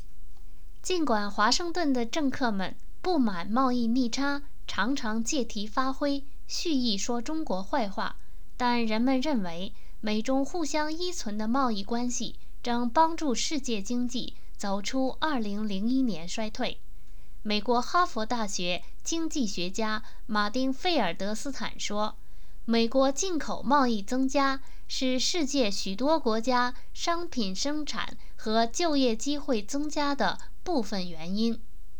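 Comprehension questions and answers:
Please answer the following questions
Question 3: From Martin Feldstein's point of view, what is the partial reason for the increasing commodity production and job opportunities in many countries?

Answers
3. The growth in US imports

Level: M.Phil Year 2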